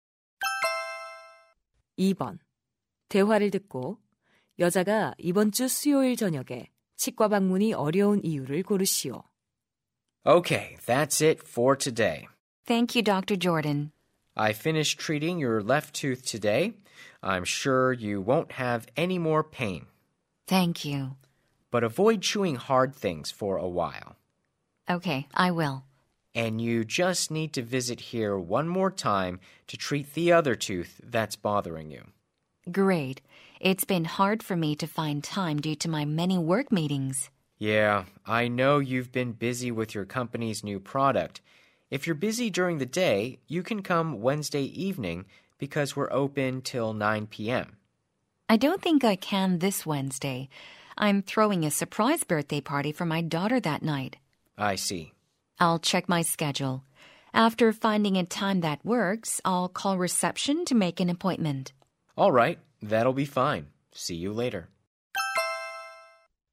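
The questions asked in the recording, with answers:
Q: 대화를 듣고 여자가 이번 주 수요일 저녁에 치과 방문이 어려운 이유를 고르시오.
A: 딸의 깜짝 생일 파티를 열어야 해서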